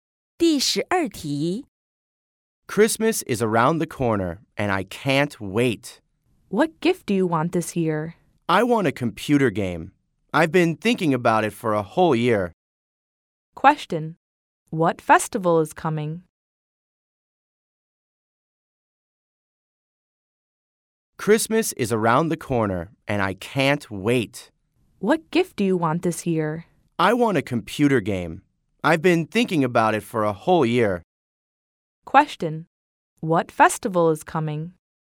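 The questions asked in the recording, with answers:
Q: What festival is coming?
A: Christmas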